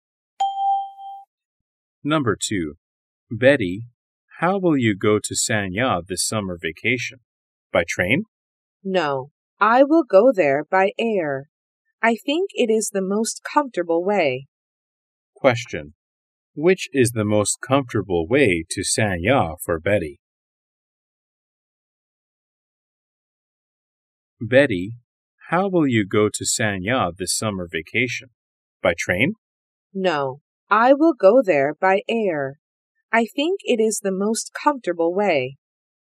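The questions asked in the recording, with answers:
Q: Question. Which is the most comfortable way to Sanya for Betty?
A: By air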